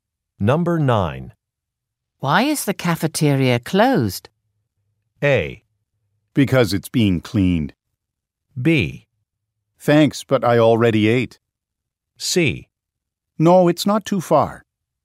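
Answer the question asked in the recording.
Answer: A: Because it's being cleaned.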